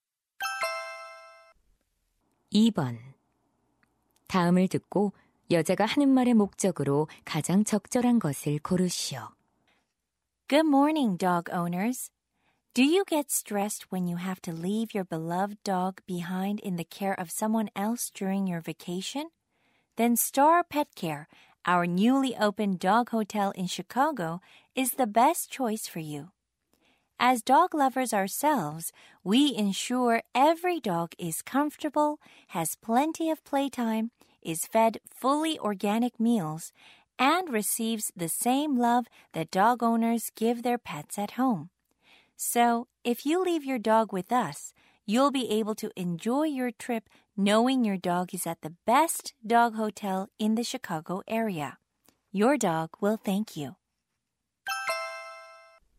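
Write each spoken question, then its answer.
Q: 다음을 듣고 여자가 하는 말의 목적으로 가장 적절한 것을 고르시오.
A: 새로 문을 연 애견 호텔을 홍보하려고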